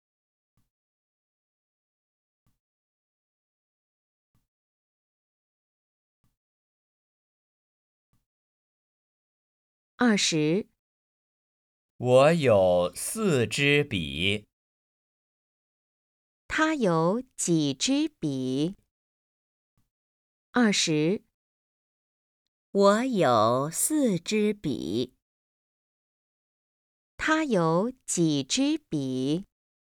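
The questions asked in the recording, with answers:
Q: 他有几支笔?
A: 四支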